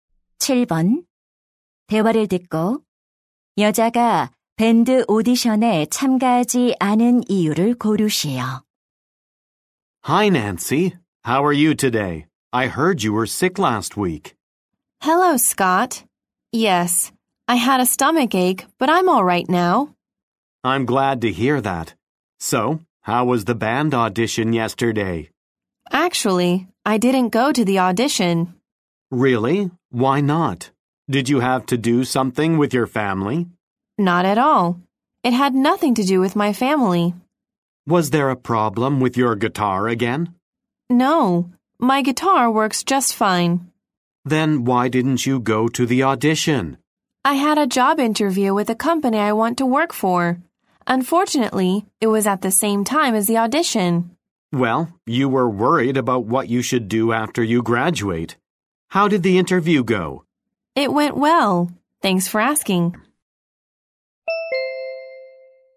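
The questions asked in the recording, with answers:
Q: 대화를 듣고 여자가 밴드 오디션에 참가하지 않은 이유를 고르시오.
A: 취업 면접이 오디션과 같은 시간에 있어서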